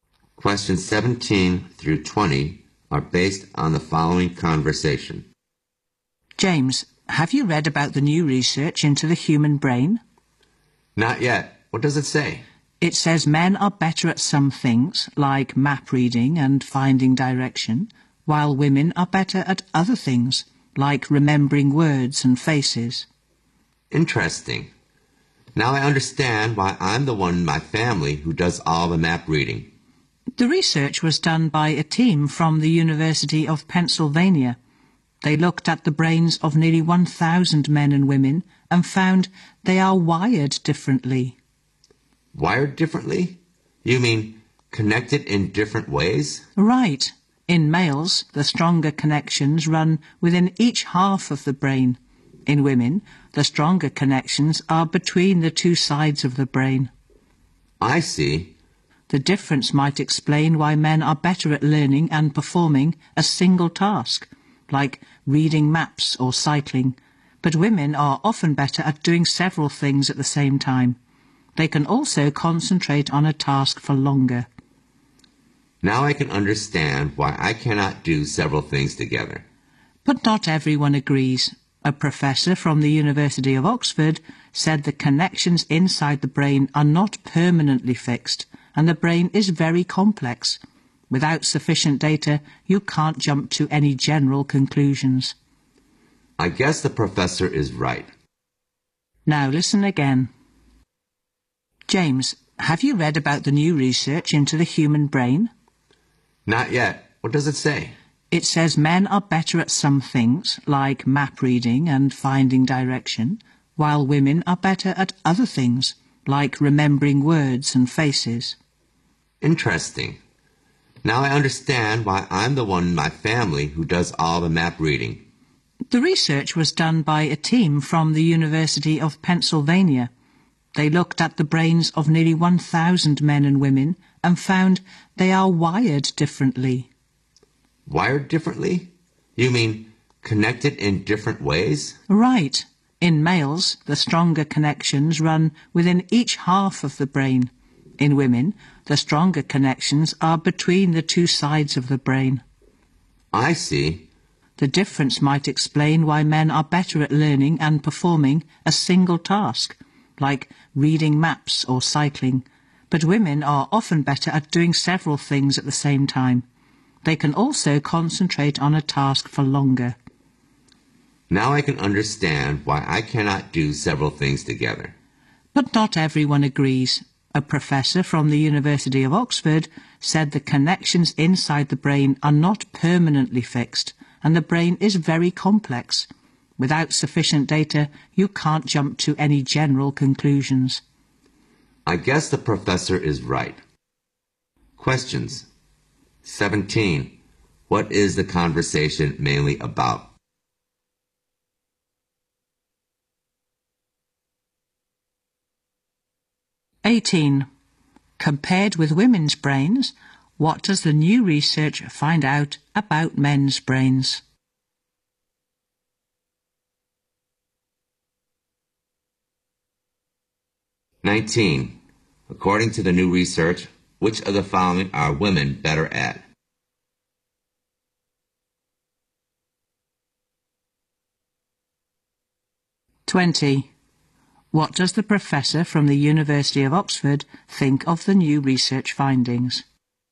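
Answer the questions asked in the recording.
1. Research on differences between men's and women's brains
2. Stronger connections run within each half of the brain
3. Doing several things at the same time
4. Conclusions can't be drawn without sufficient data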